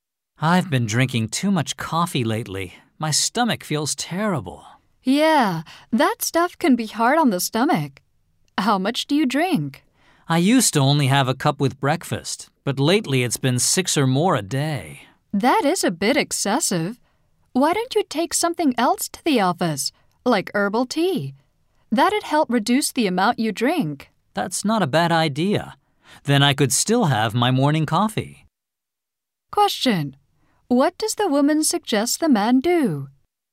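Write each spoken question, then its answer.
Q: What does the woman suggest the man do?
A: Take herbal tea to the office instead of drinking so much coffee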